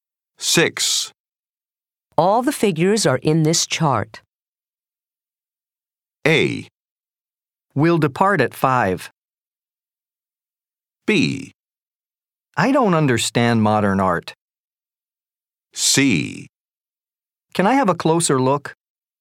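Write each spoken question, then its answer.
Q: All the figures are in this chart.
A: C: Can I have a closer look?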